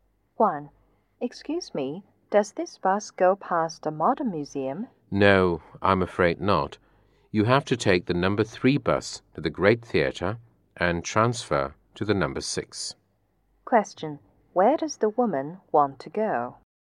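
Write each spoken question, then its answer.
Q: Where does the woman want to go?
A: The modern museum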